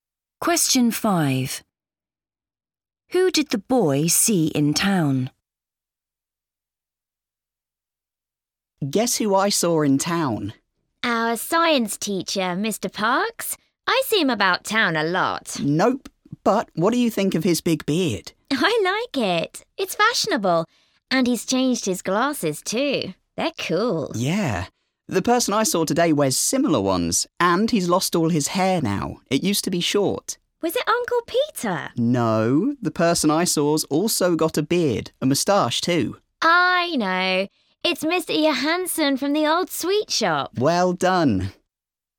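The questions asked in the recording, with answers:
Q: Who did the boy see in town?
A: Mr. Johansson from the old sweet shop (bald, with beard, moustache and glasses)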